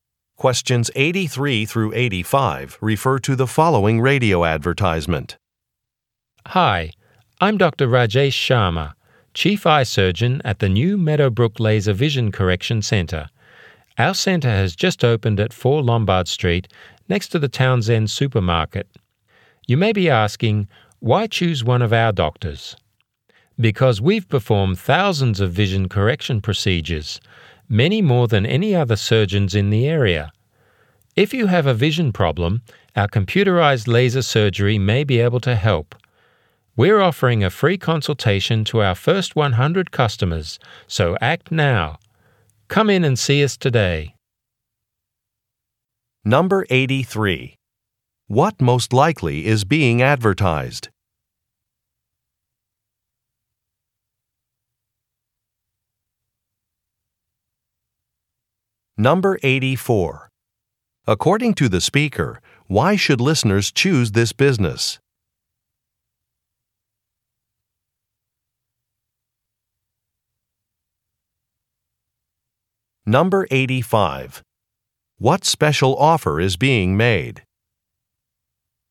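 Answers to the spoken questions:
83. A laser vision correction center
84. Its doctors are very experienced
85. A free consultation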